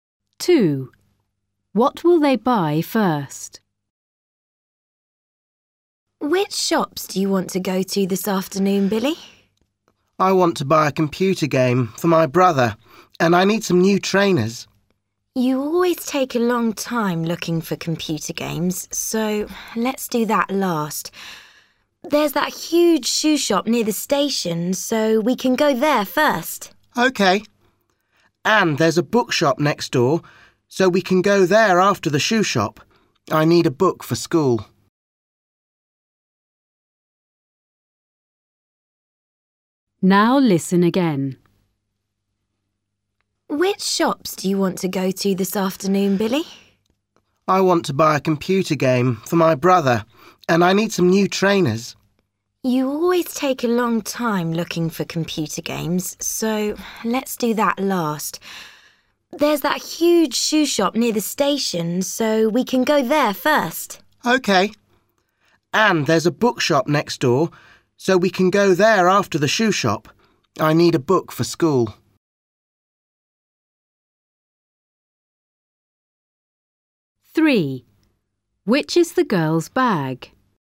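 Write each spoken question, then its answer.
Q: What will they buy first?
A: trainers (at the shoe shop)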